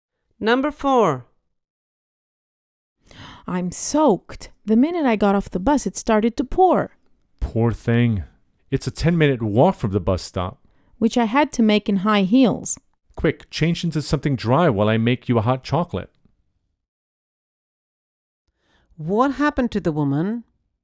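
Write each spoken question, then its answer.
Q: What happened to the woman?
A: She got soaked in the rain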